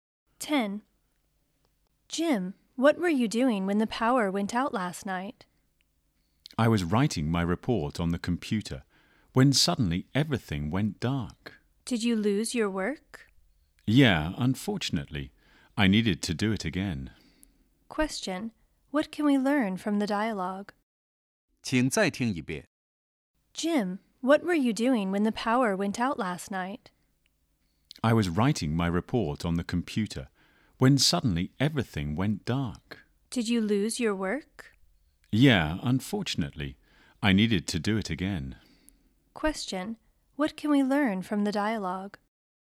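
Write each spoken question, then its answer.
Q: What can we learn from the dialogue?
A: Jim lost his report when the power went out and had to do it again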